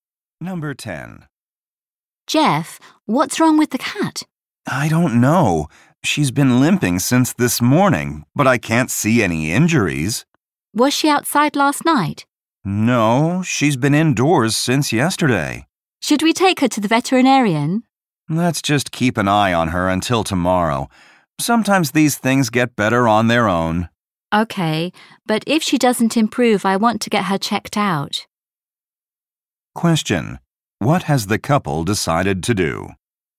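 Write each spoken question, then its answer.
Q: Question. What has the couple decided to do?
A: Watch the cat until tomorrow before taking her to the vet.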